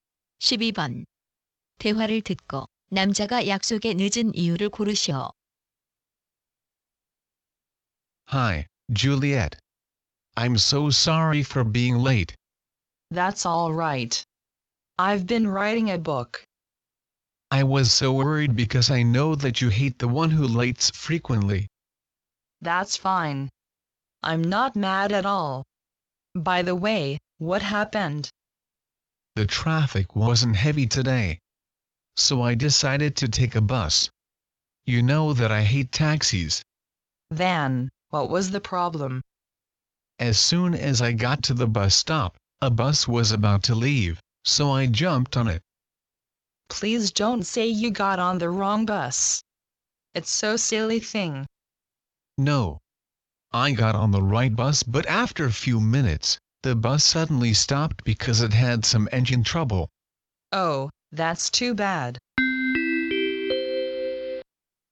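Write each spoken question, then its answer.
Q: 대화를 듣고 남자가 약속에 늦은 이유를 고르시오.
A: 버스 엔진이 고장 나서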